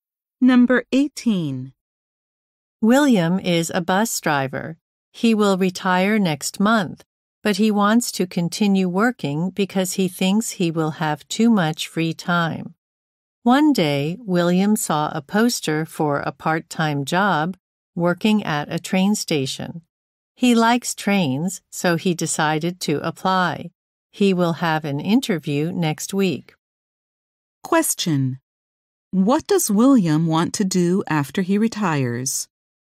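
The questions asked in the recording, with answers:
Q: What does William want to do after he retires?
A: Keep working, at a train station part-time.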